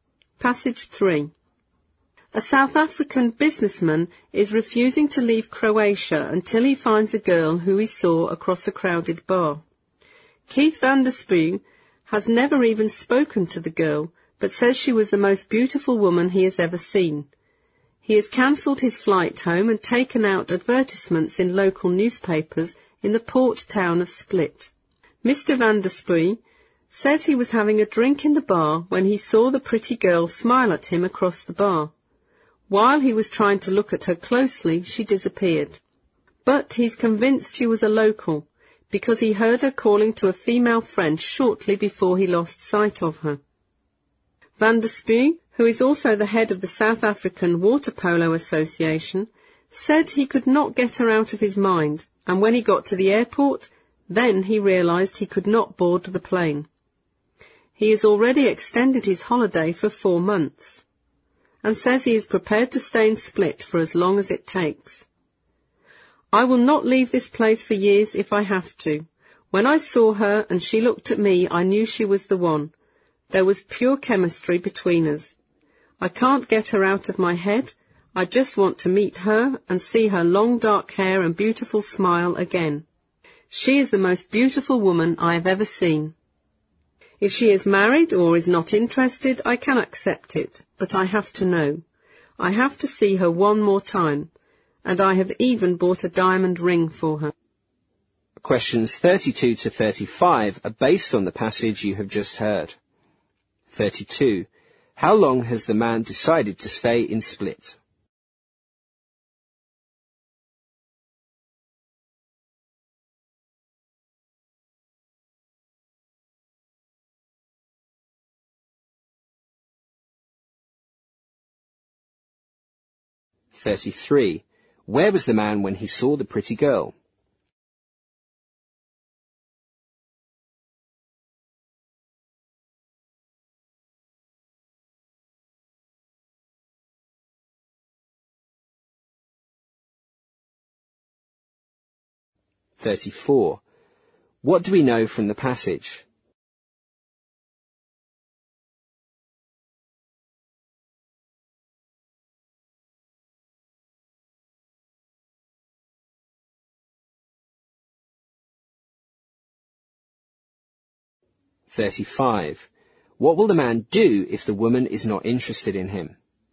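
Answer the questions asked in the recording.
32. As long as it takes to find the girl
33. In a bar
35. Accept it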